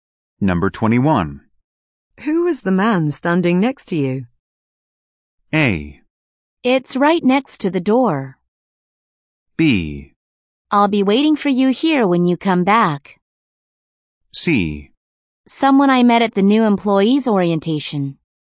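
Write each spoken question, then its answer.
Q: Who was the man standing next to you?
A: C: Someone I met at the new employee's orientation.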